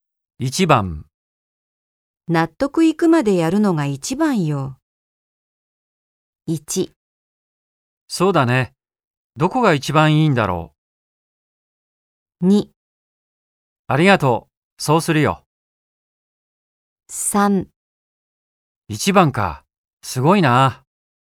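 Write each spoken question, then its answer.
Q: 納得いくまでやるのが一番よ。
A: 2: ありがとう。そうするよ。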